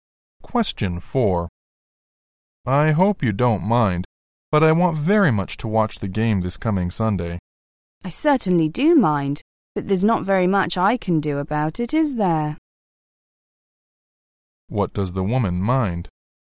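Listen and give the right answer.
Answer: That the man will watch the game on Sunday.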